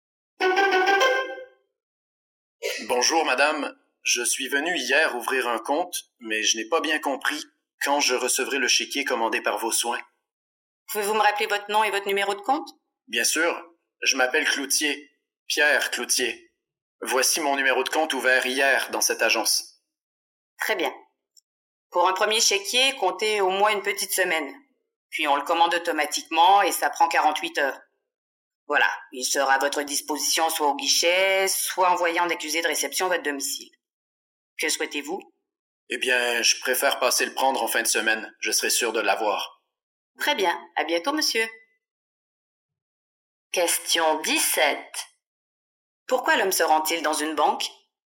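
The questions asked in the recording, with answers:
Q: Pourquoi l'homme se rend-il dans une banque?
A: Pour savoir quand il recevra son chéquier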